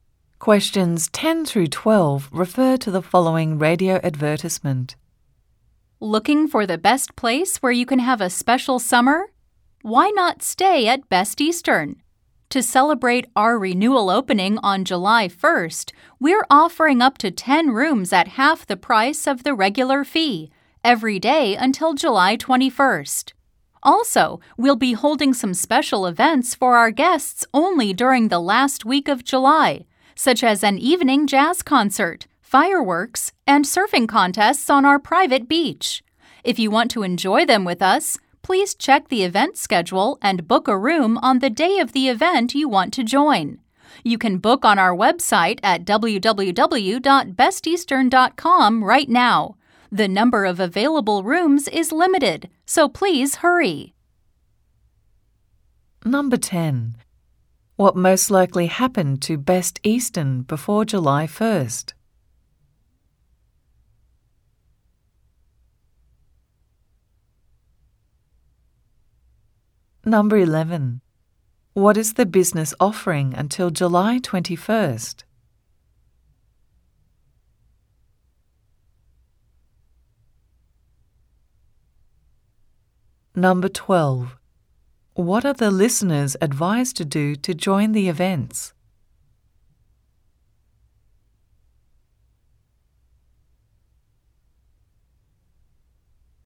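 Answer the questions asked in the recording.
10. It was renovated.
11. Up to 10 rooms at half the regular price every day
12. Check the event schedule and book a room on the day of the event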